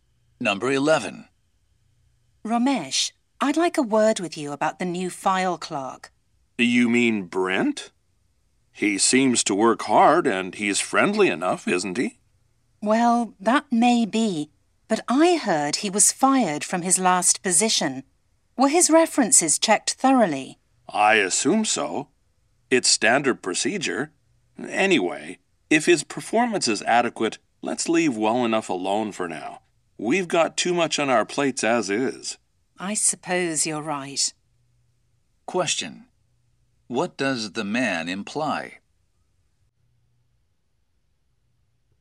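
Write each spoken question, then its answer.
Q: What does the man imply?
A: They should not worry about Brent for now, as long as his work is adequate.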